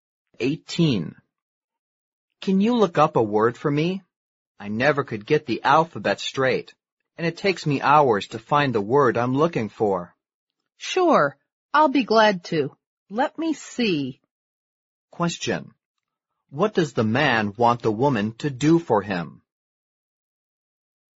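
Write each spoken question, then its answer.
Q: What does the man want the woman to do for him?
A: Look up a word for him.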